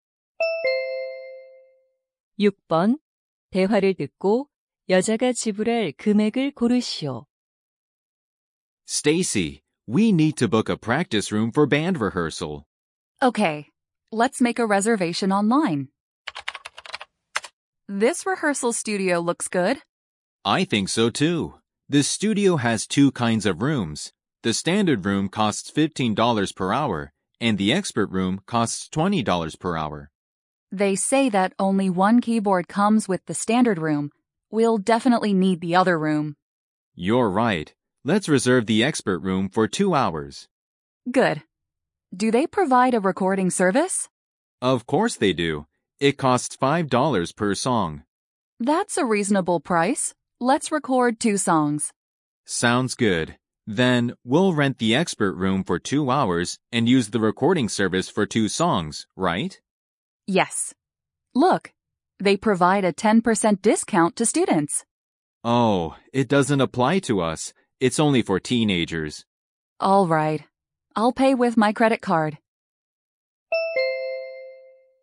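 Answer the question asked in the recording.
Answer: 50달러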